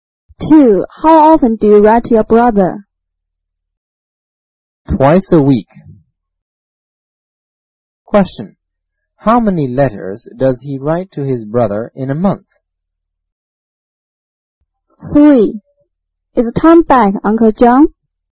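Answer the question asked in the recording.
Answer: About eight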